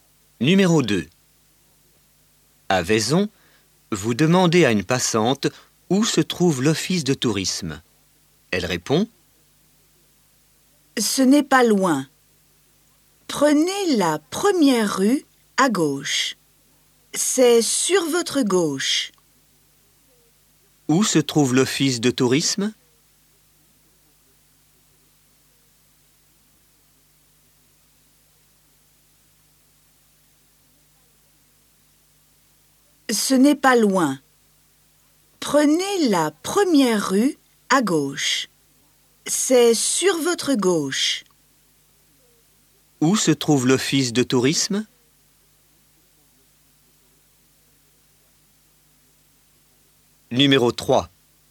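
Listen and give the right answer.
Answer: Première rue à gauche, sur votre gauche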